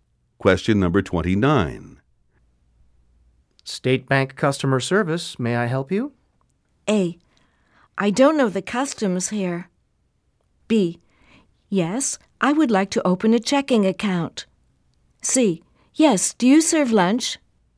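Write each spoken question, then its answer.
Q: State Bank customer service, may I help you?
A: B: Yes, I would like to open a checking account.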